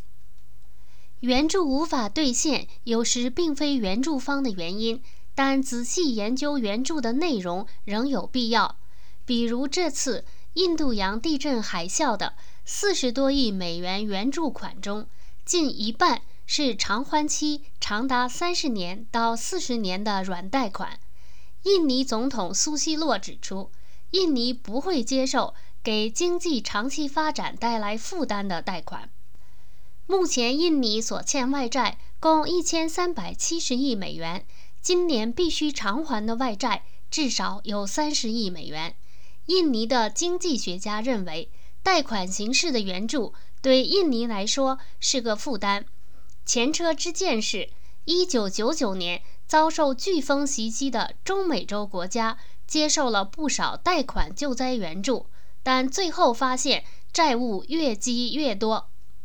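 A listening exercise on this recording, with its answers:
Please answer the following questions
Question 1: 有关国家和组织共承诺向地震海啸受灾国提供多少美元的援助?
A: 40多亿美元

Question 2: 为什么印尼不会接受长期贷款形式的援助?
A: 因为这种贷款会给经济长期发展带来负担;印尼外债已达1370亿美元,今年至少要偿还30亿美元

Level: 3rd Year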